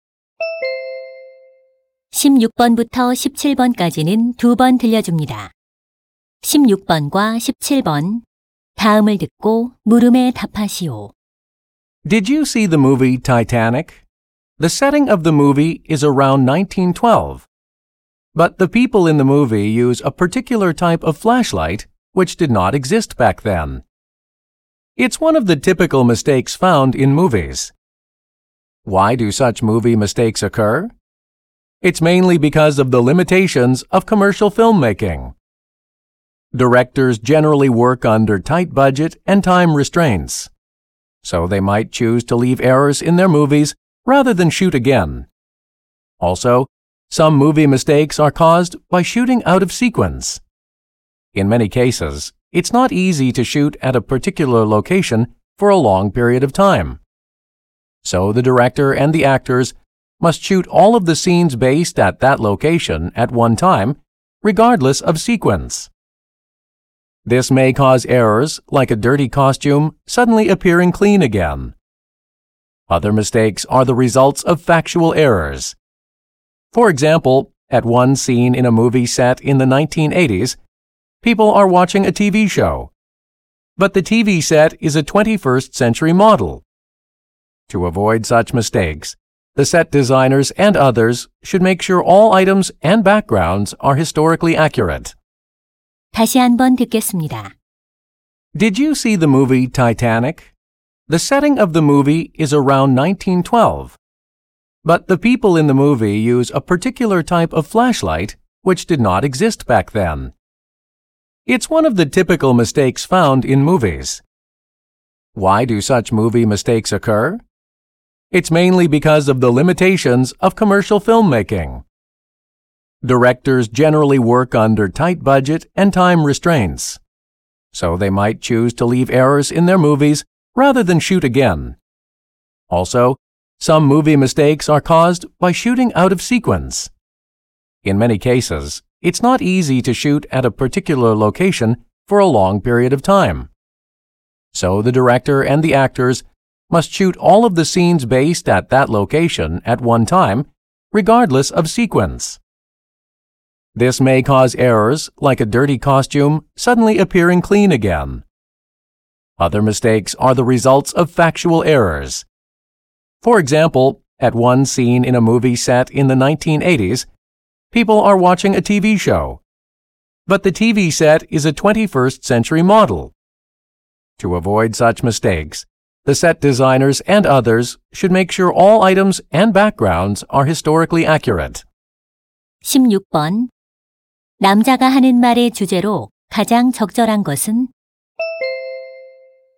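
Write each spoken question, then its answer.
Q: 남자가 하는 말의 주제로 가장 적절한 것은?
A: 영화 속 오류가 생기는 원인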